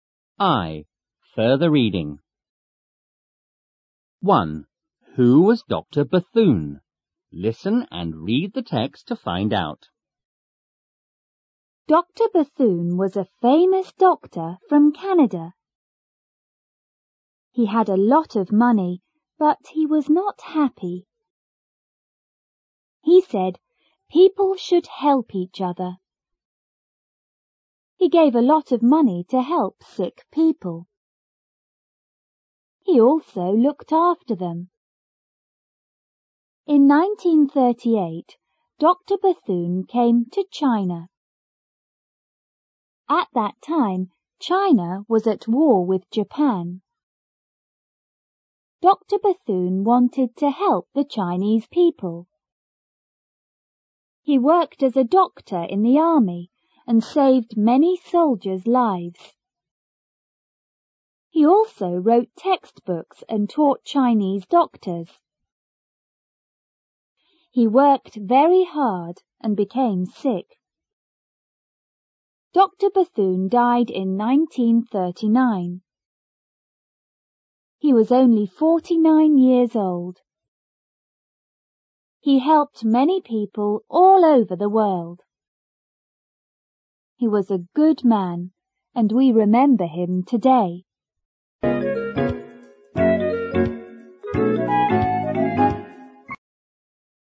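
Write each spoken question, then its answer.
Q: Who was Dr. Bethune?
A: A famous doctor from Canada who helped many people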